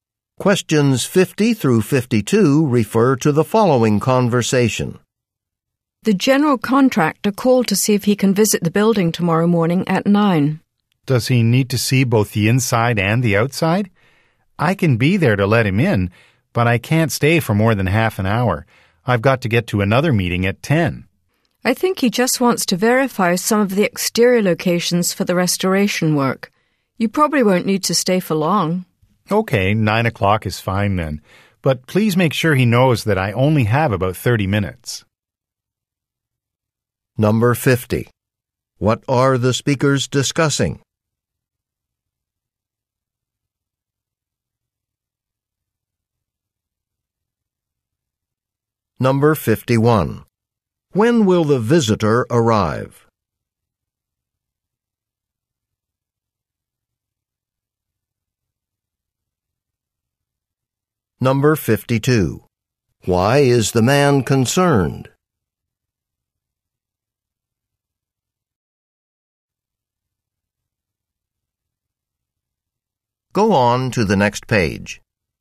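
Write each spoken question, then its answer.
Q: What are the speakers discussing?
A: A contractor's visit to the building

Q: When will the visitor arrive?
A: Tomorrow morning at 9

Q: Why is the man concerned?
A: He only has about 30 minutes before another meeting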